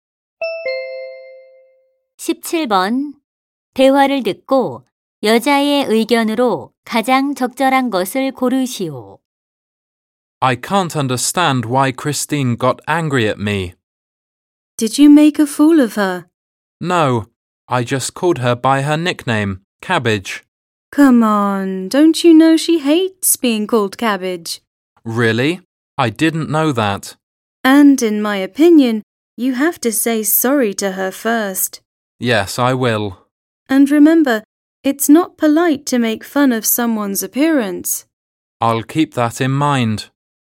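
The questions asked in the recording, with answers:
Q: 대화를 듣고 여자의 의견으로 가장 적절한 것을 고르시오.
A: 다른 사람의 외모를 놀리는 것은 무례하다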